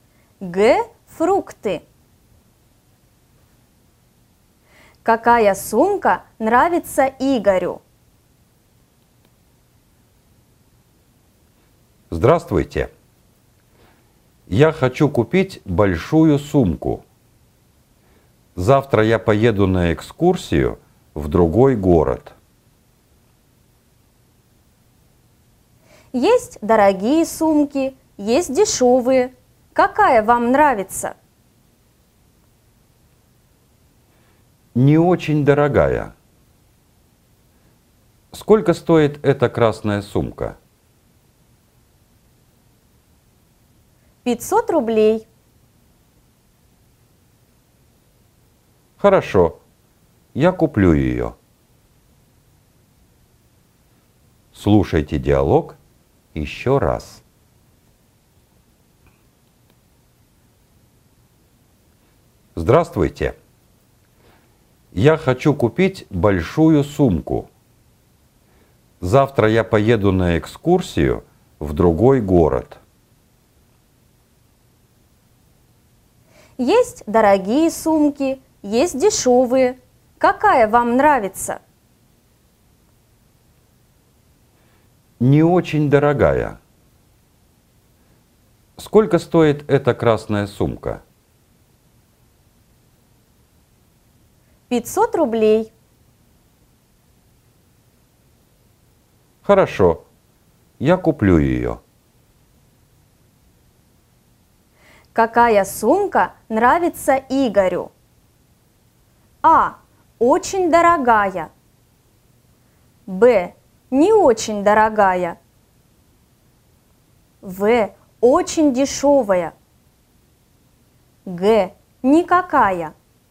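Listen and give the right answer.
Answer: Б: Не очень дорогая.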